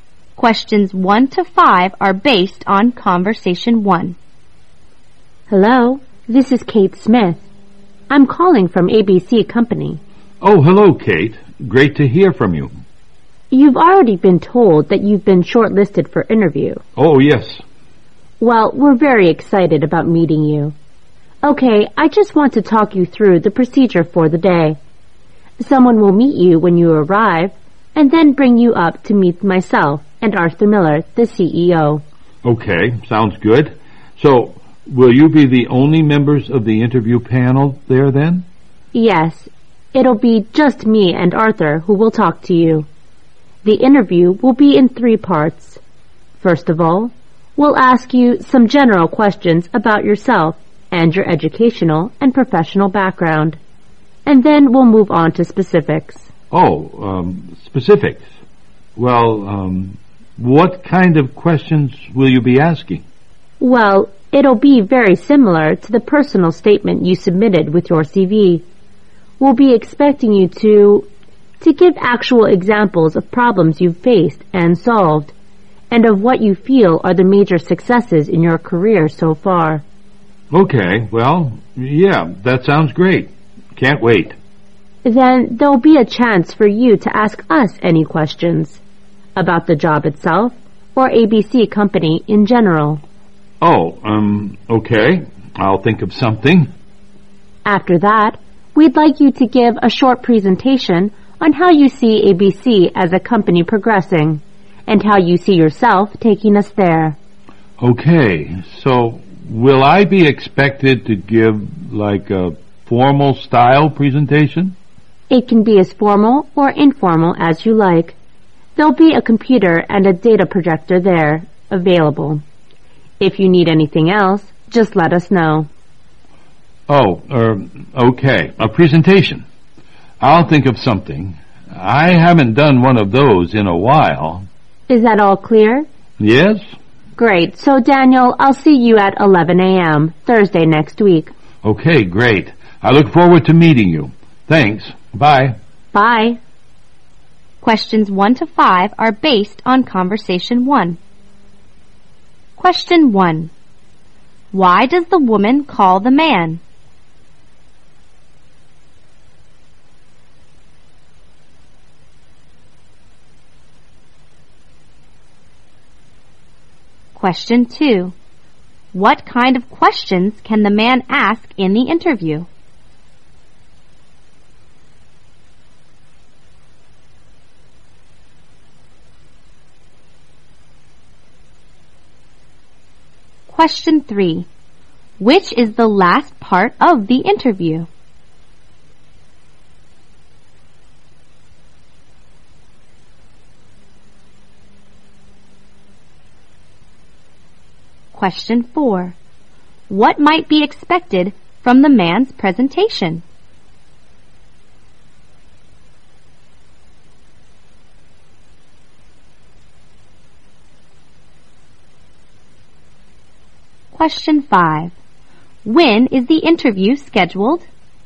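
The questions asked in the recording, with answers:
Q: Why does the woman call the man?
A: To explain the procedure for his job interview

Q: What kind of questions can the man ask in the interview?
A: Questions about the job itself or ABC Company in general

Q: Which is the last part of the interview?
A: A short presentation by the man

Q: What might be expected from the man's presentation?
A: How he sees ABC progressing and how he would take the company there

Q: When is the interview scheduled?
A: 11 a.m. Thursday next week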